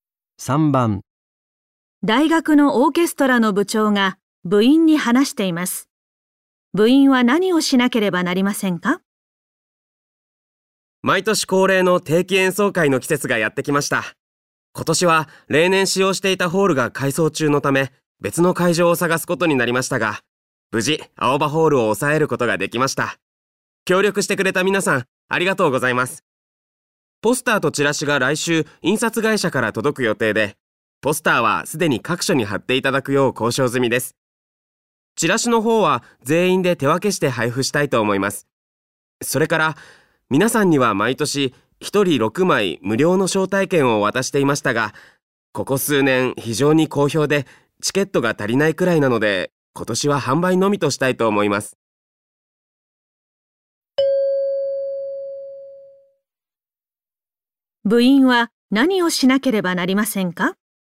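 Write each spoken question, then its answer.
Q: 部員は何をしなければなりませんか?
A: チラシを手分けして配る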